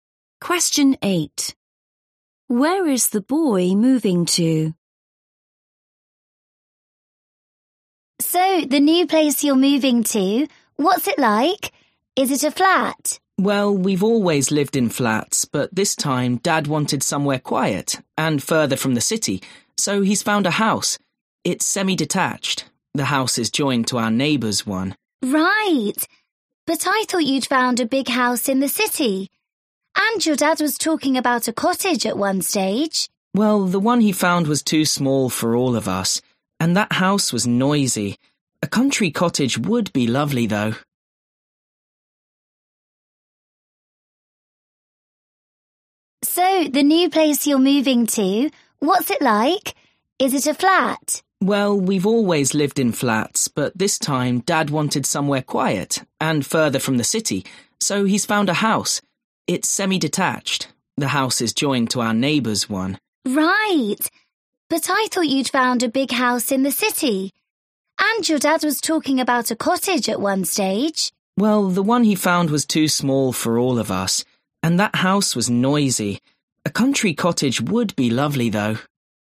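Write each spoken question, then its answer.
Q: Where is the boy moving to?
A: a semi-detached house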